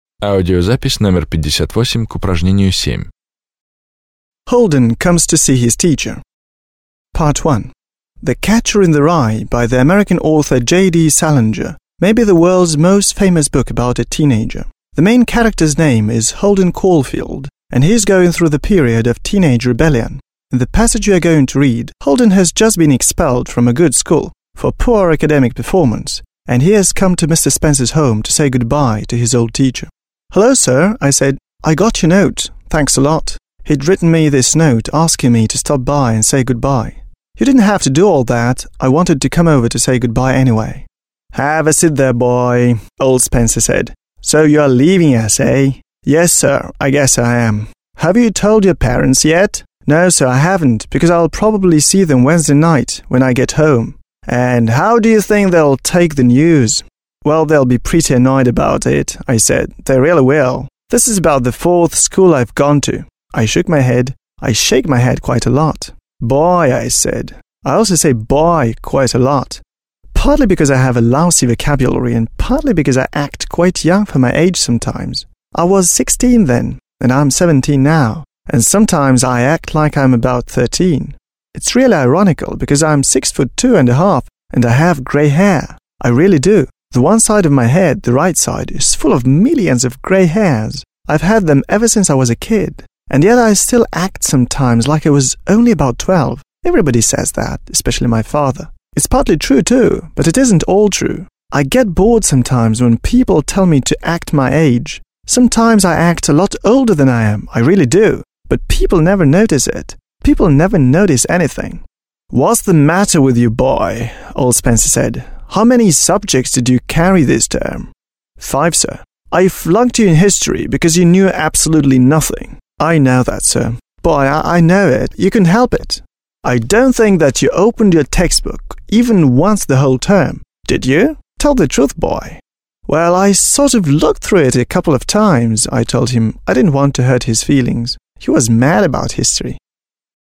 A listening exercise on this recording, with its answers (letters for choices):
7. B. Say which is right.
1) Holden was a bad pupil.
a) good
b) not very good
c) bad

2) Mr Spencer taught history in Holden's school.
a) literature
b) history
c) geography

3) Holden's parents didn't know anything about his problems.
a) were very unhappy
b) were coming to Holden's school on Wednesday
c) didn't know anything about his problems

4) Holden sometimes acted his age.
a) never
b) sometimes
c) always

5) Holden was taller than most children of his age.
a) taller than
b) shorter than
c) as tall as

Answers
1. c
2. b
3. c
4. b
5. a

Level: 9 класс